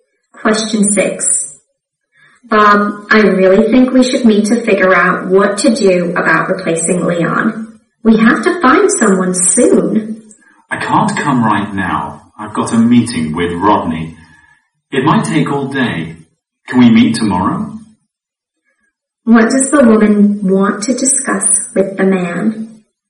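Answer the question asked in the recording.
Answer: Finding someone to replace Leon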